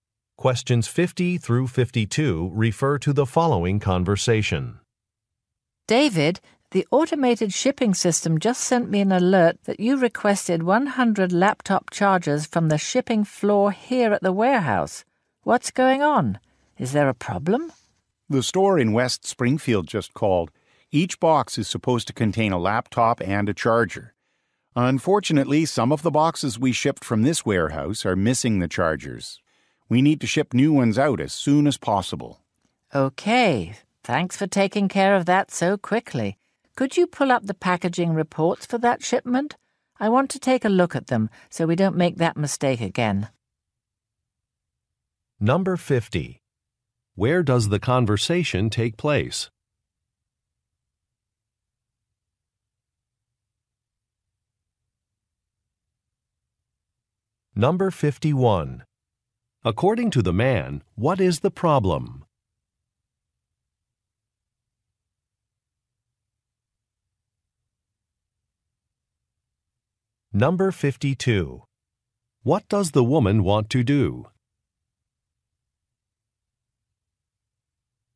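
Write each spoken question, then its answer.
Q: Where does the conversation take place?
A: At a warehouse

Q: According to the man, what is the problem?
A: Some shipped boxes are missing chargers

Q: What does the woman want to do?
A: Review the packaging reports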